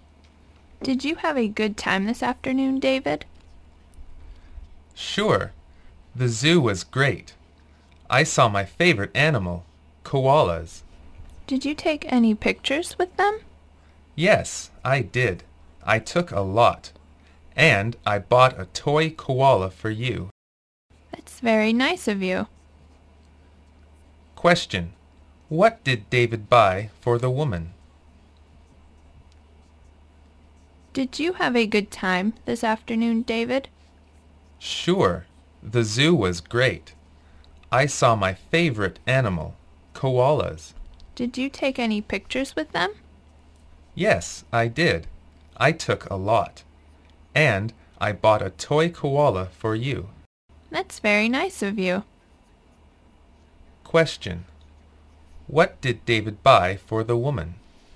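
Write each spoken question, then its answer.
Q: What did David buy for the woman?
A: A toy koala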